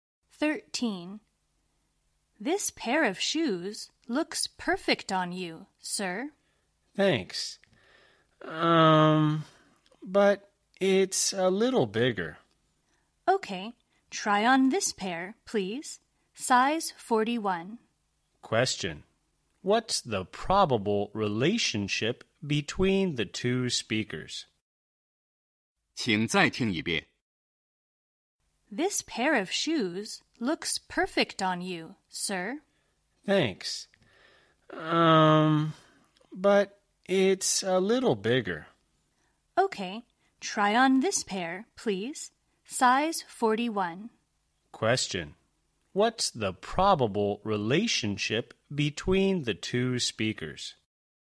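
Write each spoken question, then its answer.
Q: What's the probable relationship between the two speakers?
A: Shop assistant and customer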